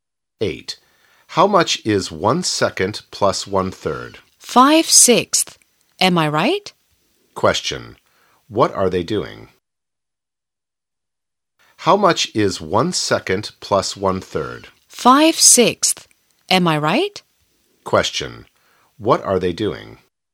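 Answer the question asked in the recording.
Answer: Doing maths (adding fractions)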